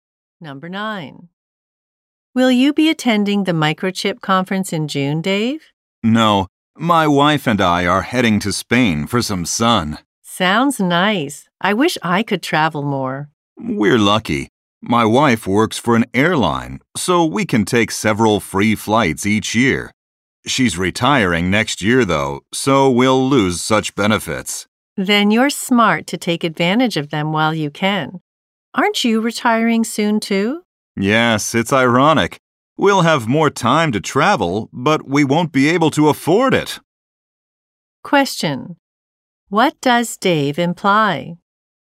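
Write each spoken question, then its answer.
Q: What does Dave imply?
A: After he retires, he won't be able to afford to travel.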